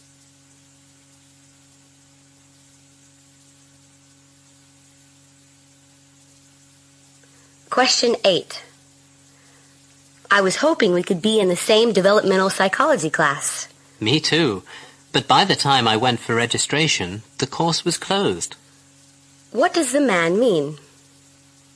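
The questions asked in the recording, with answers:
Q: What does the man mean?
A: He couldn't enroll because the course was already closed.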